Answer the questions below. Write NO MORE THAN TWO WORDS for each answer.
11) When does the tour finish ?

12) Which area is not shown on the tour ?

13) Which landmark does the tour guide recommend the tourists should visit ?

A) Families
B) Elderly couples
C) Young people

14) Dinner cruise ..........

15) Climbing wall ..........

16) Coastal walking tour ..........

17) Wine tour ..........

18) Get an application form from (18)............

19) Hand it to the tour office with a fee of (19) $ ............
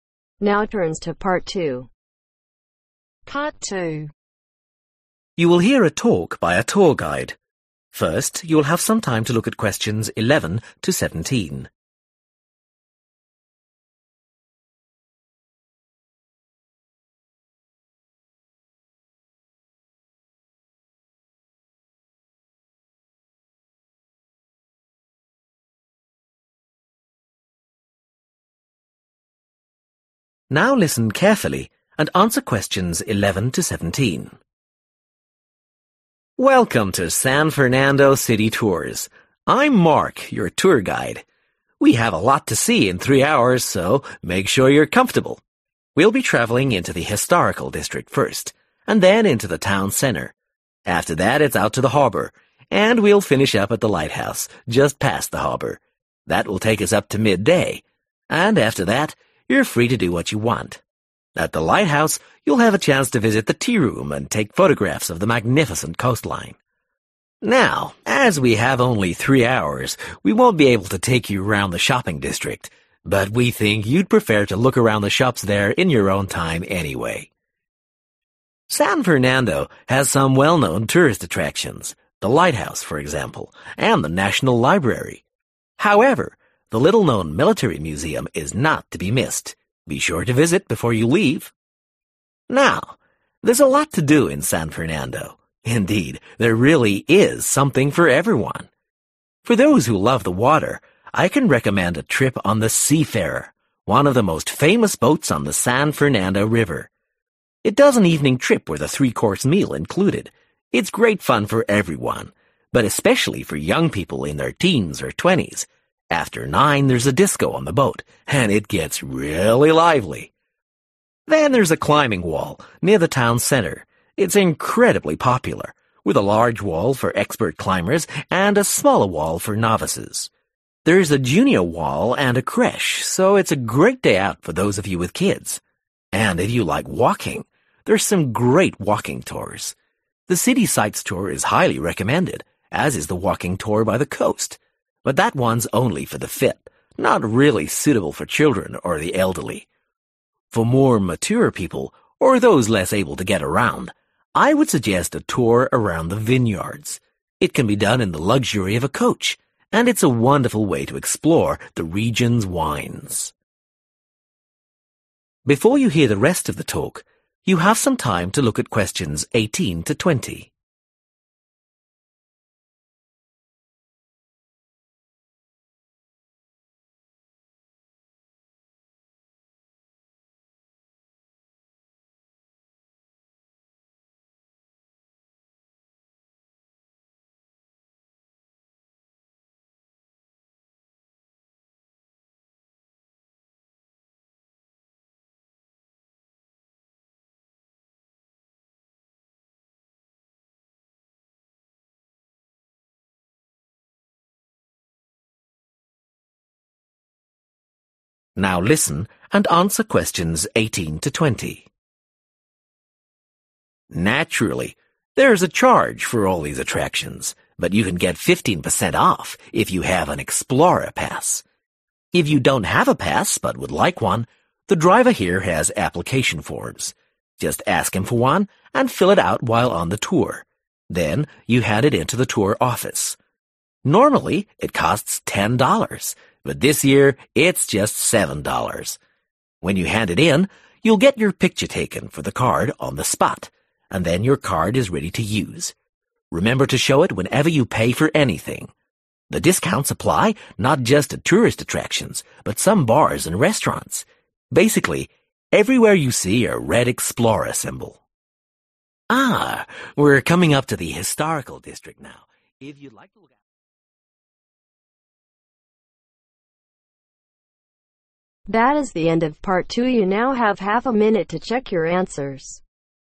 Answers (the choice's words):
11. Midday
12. Shopping district
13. Military Museum
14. Young people
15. Families
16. Young people
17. Elderly couples
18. The driver
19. 7.00 / 7